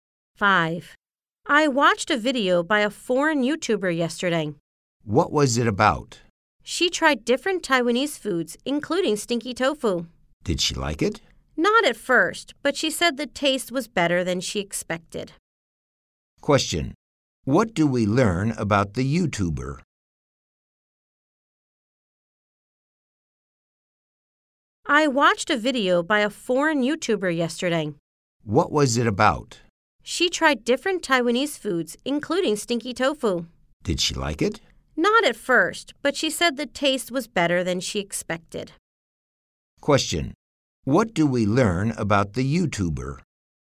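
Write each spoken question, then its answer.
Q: What do we learn about the YouTuber?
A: She tried stinky tofu and found it tasted better than she expected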